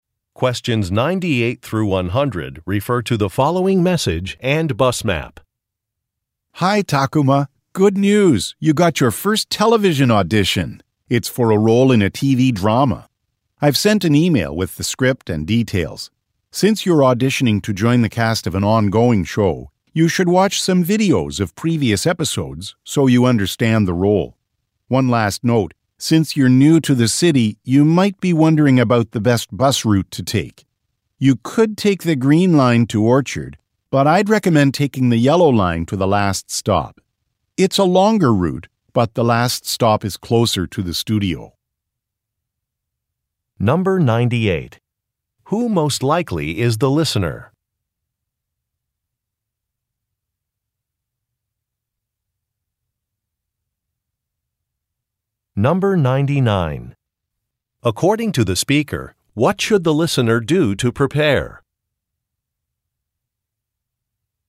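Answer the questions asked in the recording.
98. An actor
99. Watch videos of previous episodes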